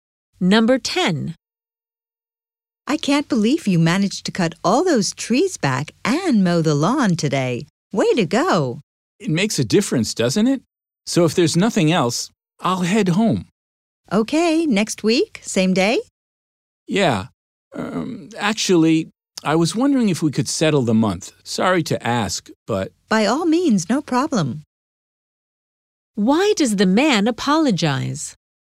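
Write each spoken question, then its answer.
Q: Why does the man apologize?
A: He is asking to be paid for the month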